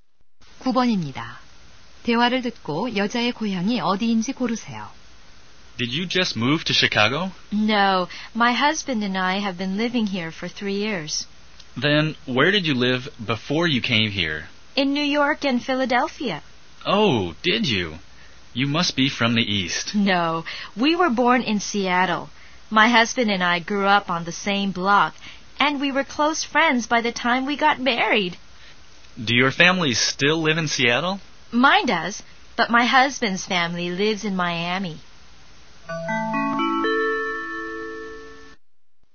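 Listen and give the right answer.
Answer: 시애틀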